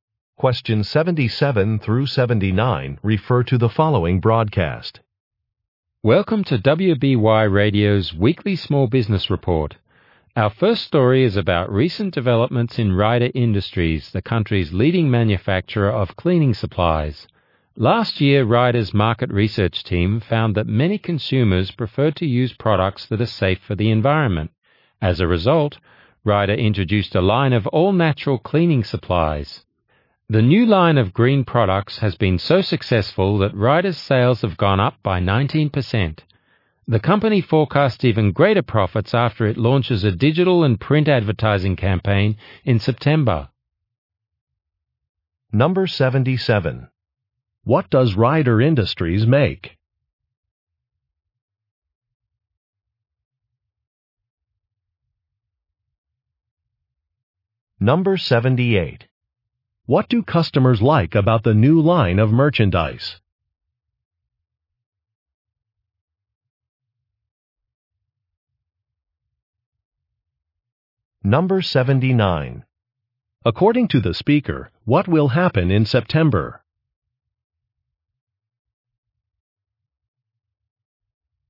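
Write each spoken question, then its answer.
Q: What does Ryder Industries make?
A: Cleaning supplies

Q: What do customers like about the new line of merchandise?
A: It is safe for the environment

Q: According to the speaker, what will happen in September?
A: An advertising campaign will launch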